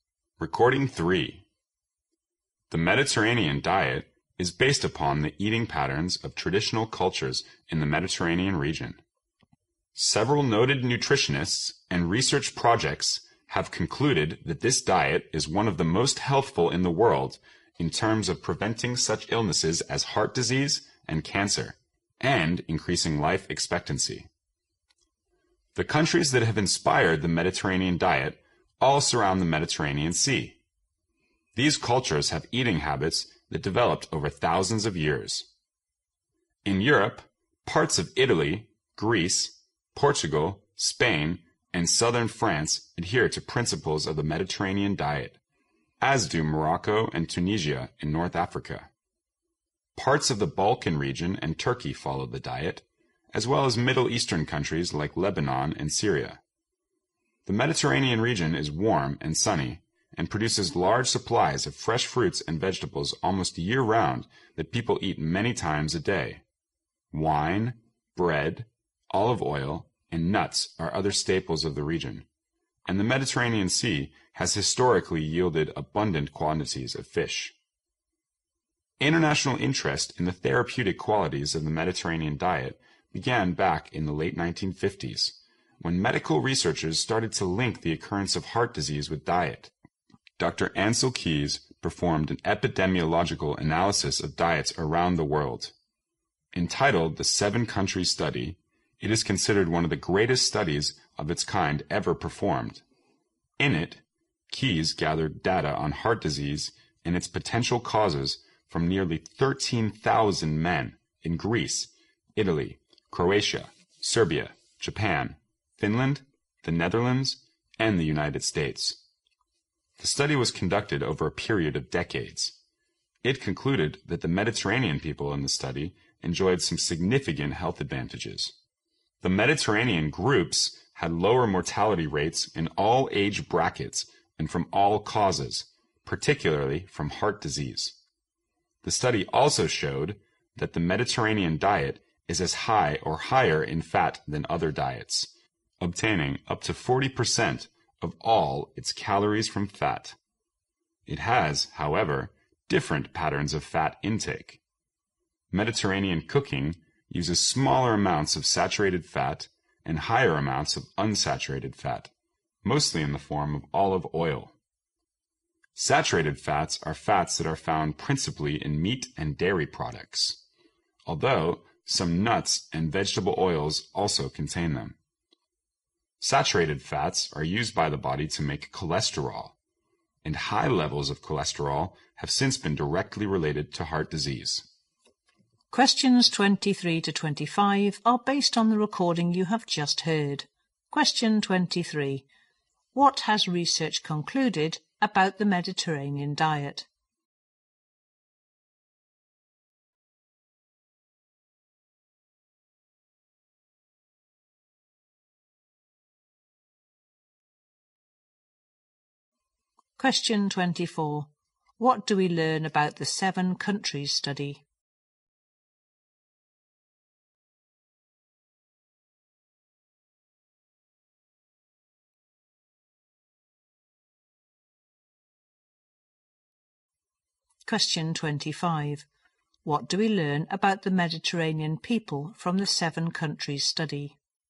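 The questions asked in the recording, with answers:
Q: What has research concluded about the Mediterranean diet?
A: It is one of the most healthful diets, helping prevent heart disease and cancer

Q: What do we learn about the Mediterranean people from the seven countries study?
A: They had lower death rates, especially from heart disease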